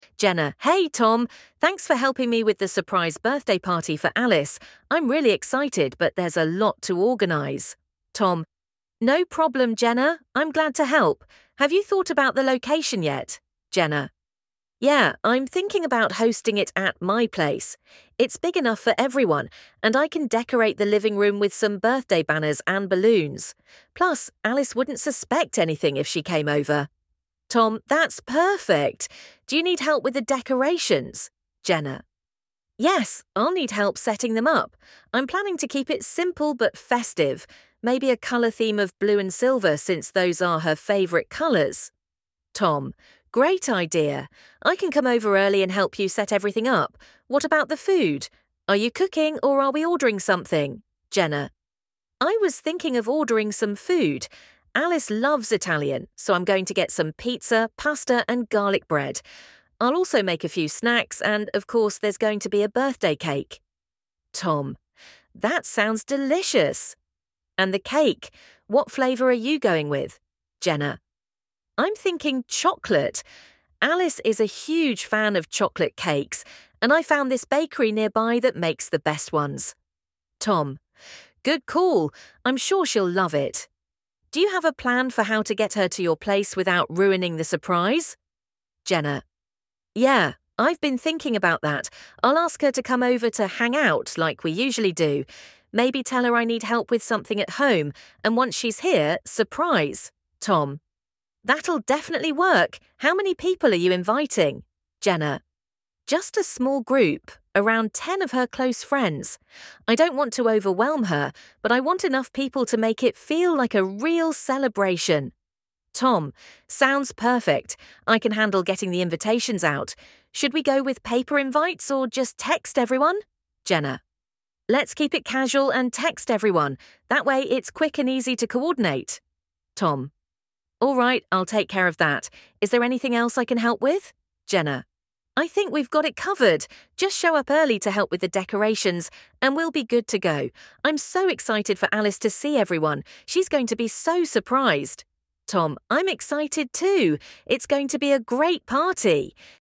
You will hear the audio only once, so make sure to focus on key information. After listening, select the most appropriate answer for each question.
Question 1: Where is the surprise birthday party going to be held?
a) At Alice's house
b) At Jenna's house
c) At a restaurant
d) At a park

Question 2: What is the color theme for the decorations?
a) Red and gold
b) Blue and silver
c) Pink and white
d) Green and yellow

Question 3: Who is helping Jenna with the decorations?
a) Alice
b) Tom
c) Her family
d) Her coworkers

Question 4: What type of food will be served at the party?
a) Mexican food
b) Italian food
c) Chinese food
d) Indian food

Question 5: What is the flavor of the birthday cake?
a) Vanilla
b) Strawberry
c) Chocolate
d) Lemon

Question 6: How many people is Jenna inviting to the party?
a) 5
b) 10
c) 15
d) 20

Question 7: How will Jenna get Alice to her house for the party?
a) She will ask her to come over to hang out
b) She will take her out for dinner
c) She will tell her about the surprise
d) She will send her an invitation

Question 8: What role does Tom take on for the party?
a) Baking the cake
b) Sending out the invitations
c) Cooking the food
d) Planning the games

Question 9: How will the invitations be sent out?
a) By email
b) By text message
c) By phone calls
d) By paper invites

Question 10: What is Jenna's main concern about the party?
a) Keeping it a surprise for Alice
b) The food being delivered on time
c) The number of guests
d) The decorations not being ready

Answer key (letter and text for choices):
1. b) At Jenna's house
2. b) Blue and silver
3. b) Tom
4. b) Italian food
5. c) Chocolate
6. b) 10
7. a) She will ask her to come over to hang out
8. b) Sending out the invitations
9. b) By text message
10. a) Keeping it a surprise for Alice

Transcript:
[Person A: Jenna]
Hey, Tom! Thanks for helping me with the surprise birthday party for Alice. I'm really excited, but there's a lot to organize.
[Person B: Tom]
No problem, Jenna! I'm glad to help. Have you thought about the location yet?
[Jenna]
Yeah, I'm thinking about hosting it at my place. It's big enough for everyone, and I can decorate the living room with some birthday banners and balloons. Plus, Alice wouldn't suspect anything if she came over.
That's perfect! Do you need help with the decorations?
[Jenna]
Yes, I'll need help setting them up. I'm planning to keep it simple but festive—maybe a color theme of blue and silver since those are her favorite colors.
Great idea! I can come over early and help you set everything up. What about the food? Are you cooking, or are we ordering something?
[Jenna]
I was thinking of ordering some food. Alice loves Italian, so I'm going to get some pizza, pasta, and garlic bread. I'll also make a few snacks and, of course, there's going to be a birthday cake.
That sounds delicious! And the cake—what flavor are you going with?
[Jenna]
I'm thinking chocolate. Alice is a huge fan of chocolate cakes, and I found this bakery nearby that makes the best ones.
Good call! I'm sure she'll love it. Do you have a plan for how to get her to your place without ruining the surprise?
[Jenna]
Yeah, I've been thinking about that. I'll ask her to come over to "hang out" like we usually do. Maybe tell her I need help with something at home, and once she's here—surprise!
That'll definitely work! How many people are you inviting?
[Jenna]
Just a small group—around 10 of her close friends. I don't want to overwhelm her, but I want enough people to make it feel like a real celebration.
Sounds perfect. I can handle getting the invitations out. Should we go with paper invites, or just text everyone?
[Jenna]
Let's keep it casual and text everyone. That way, it's quick and easy to coordinate.
Alright, I'll take care of that. Is there anything else I can help with?
[Jenna]
I think we've got it covered! Just show up early to help with the decorations, and we'll be good to go. I'm so excited for Alice to see everyone. She's going to be so surprised!
I'm excited too. It's going to be a great party!